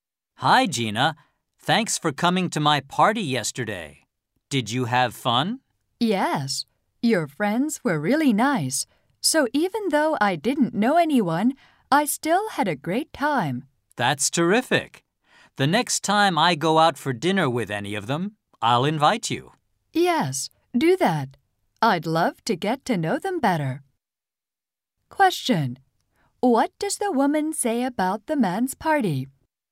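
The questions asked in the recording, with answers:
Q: What does the woman say about the man's party?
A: She had a great time even though she didn't know anyone; his friends were really nice.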